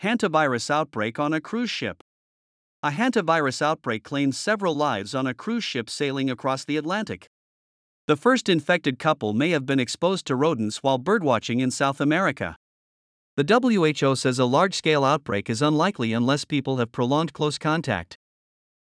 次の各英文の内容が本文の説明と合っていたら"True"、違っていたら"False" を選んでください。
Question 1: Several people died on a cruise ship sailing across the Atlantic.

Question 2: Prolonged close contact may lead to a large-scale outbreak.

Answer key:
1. True
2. True

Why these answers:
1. 1番目のセンテンスで、「大西洋を航行中のクルーズ船でハンタウイルスの集団感染が発生し、複数の死者が出た。」と述べています。設問の内容と一致するため、解答はTrue となります。
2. 3番目のセンテンスで、「WHOは、人々が長時間の濃厚接触をしない限り、大規模な流行が起きる危険性は低いとしている」と述べています。つまり、長時間の濃厚接触が大規模な流行の要因となりうる、という意味なので、解答はTrue となります。

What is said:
Hantavirus Outbreak on a Cruise Ship
A hantavirus outbreak claimed several lives on a cruise ship sailing across the Atlantic.
The first infected couple may have been exposed to rodents while birdwatching in South America.
The WHO says a large-scale outbreak is unlikely unless people have prolonged close contact.